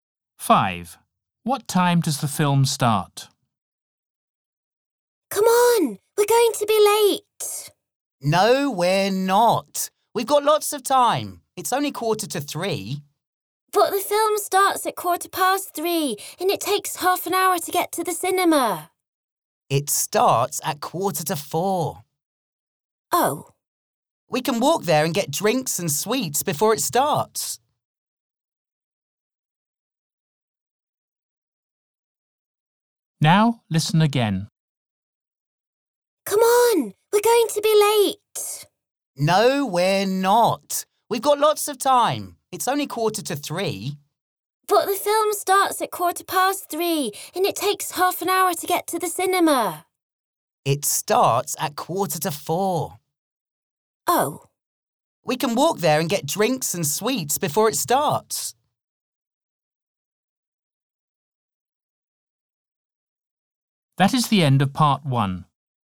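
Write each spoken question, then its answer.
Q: What time does the film start?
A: 4:45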